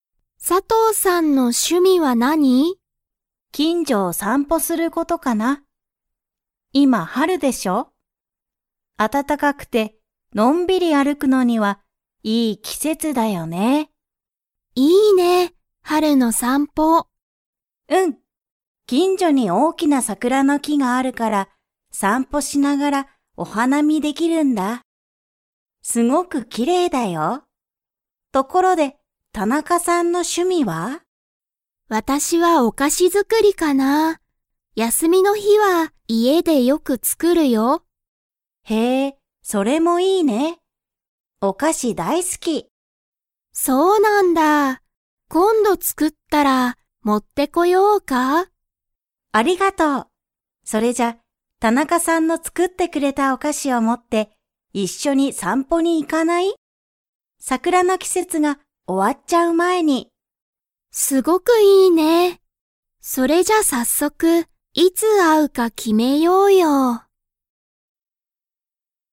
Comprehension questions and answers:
Comprehension Quiz (Skip if you don't understand the conversation yet)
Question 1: タナカさんの趣味しゅみはなんですか?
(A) 散歩さんぽ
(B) お花見はなみ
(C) お菓子かし作づくり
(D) 温泉おんせん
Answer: (C) お菓子かし作づくり

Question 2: サトウさんとタナカさんは、いつ会あうか 。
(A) まだ決きめていない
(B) もう決きめている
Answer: (A) まだ決きめていない

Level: Level 4

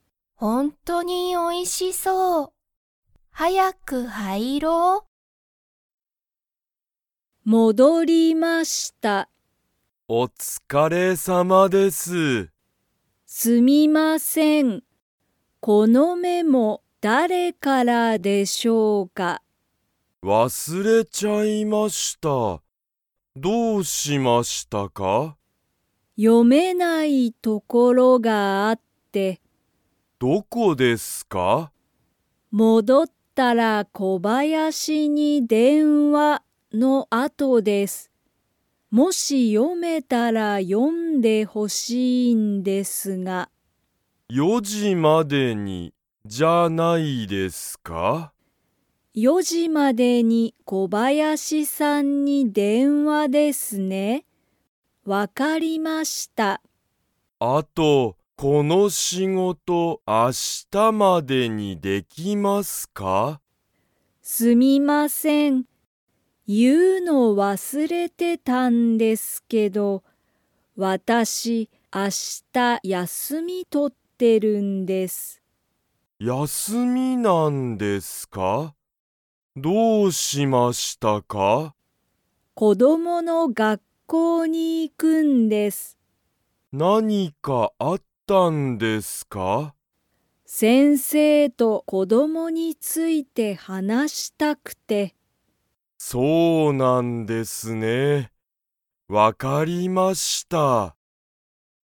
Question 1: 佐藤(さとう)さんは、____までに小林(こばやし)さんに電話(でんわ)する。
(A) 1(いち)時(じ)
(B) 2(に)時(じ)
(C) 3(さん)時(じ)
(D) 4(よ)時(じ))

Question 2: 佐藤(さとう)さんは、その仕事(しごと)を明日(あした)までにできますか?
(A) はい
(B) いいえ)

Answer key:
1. (D) 4(よ)時(じ))
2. (B) いいえ)

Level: Level 2

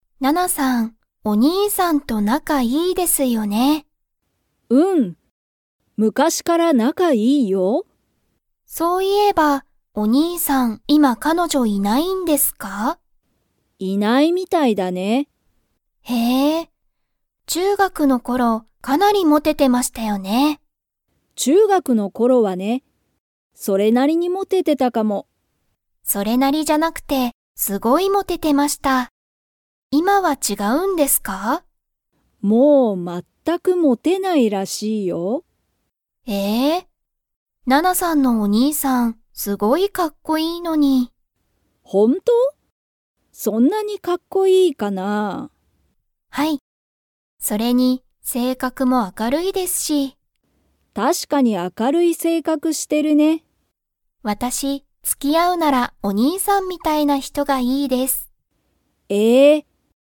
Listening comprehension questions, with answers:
Comprehension Quiz (Skip if you don't understand the conversation yet)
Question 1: ナナのお兄にいさんは、今いまモテてますか?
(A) はい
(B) いいえ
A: (B) いいえ

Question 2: ナナのお兄にいさんは、性格せいかくが 。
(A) ひどい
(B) 明あかるい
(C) かわいい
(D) 怖こわい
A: (B) 明あかるい

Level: Level 4

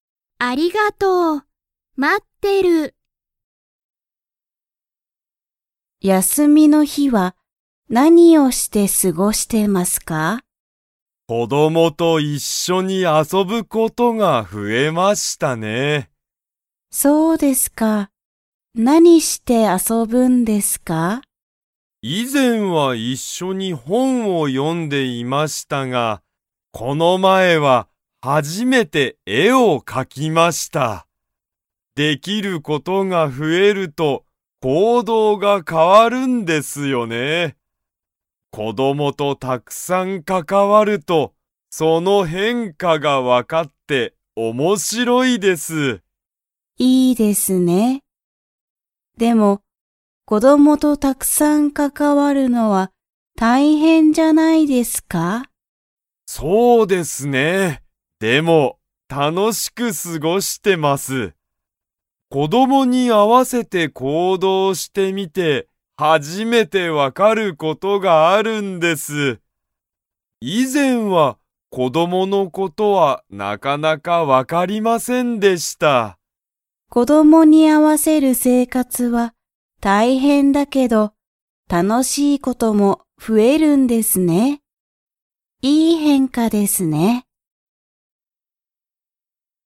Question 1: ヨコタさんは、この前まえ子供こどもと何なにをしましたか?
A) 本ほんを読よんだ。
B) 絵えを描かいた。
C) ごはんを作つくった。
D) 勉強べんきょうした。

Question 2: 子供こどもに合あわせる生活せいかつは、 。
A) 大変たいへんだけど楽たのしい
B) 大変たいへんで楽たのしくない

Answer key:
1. B) 絵えを描かいた。
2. A) 大変たいへんだけど楽たのしい

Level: Level 3

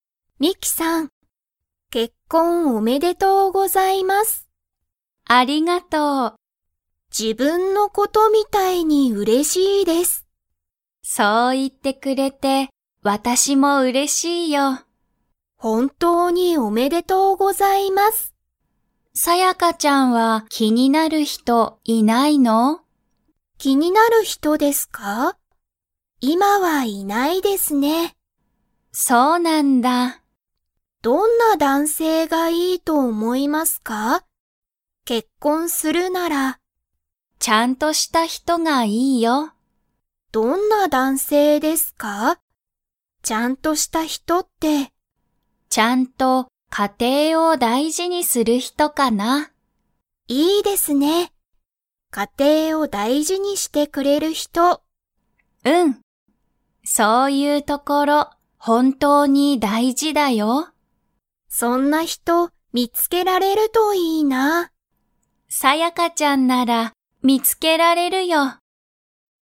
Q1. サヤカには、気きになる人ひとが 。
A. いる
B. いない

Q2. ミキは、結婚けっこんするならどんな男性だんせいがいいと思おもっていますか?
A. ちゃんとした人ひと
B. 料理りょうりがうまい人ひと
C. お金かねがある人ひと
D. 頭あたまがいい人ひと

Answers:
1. B. いない
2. A. ちゃんとした人ひと

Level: Level 3

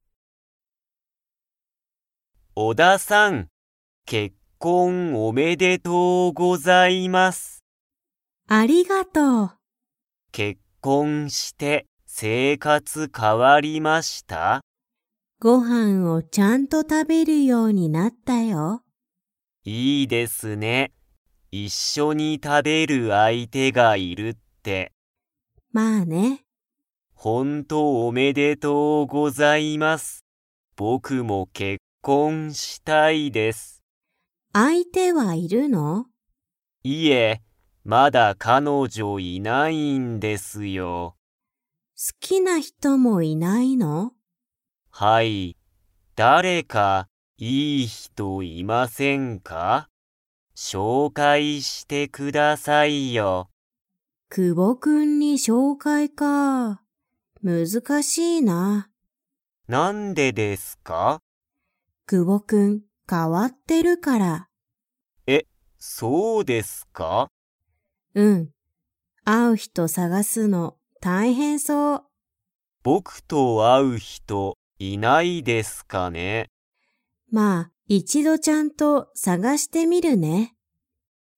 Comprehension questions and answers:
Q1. 小田おださんは、結婚けっこんして生活せいかつが変かわりましたか?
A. はい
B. いいえ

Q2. 久保くぼくんには、 がいない。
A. 親おや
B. 先生せんせい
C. 彼女かのじょ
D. 彼かれ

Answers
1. A. はい
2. C. 彼女かのじょ

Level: Level 3

